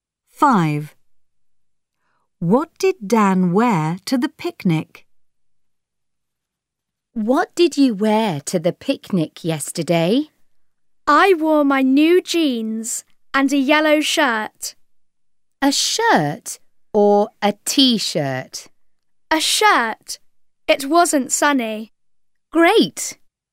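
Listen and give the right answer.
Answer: new jeans and a yellow shirt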